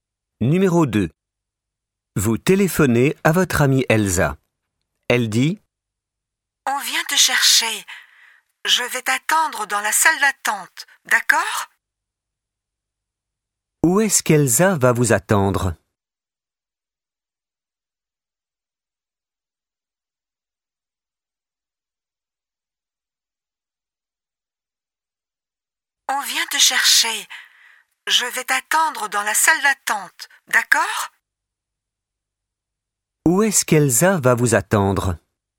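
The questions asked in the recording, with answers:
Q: Où est-ce qu'Elsa va vous attendre ?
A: Dans la salle d'attente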